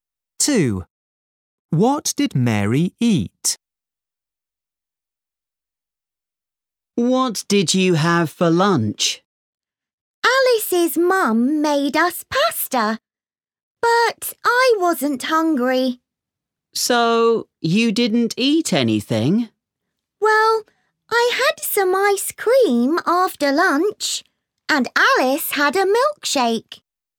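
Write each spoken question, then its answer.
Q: What did Mary eat?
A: ice cream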